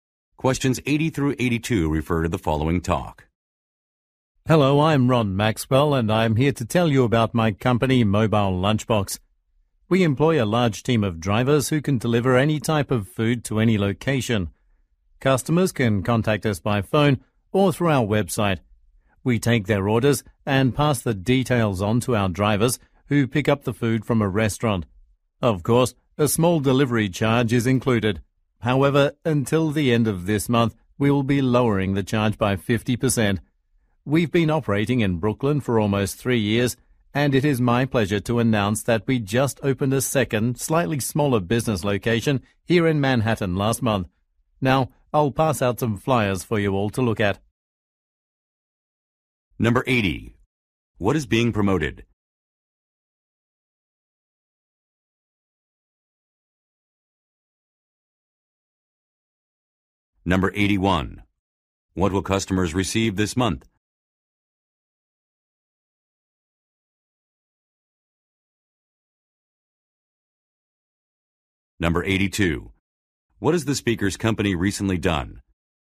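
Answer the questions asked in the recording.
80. A food delivery service
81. A 50% reduced delivery charge
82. Opened a second location in Manhattan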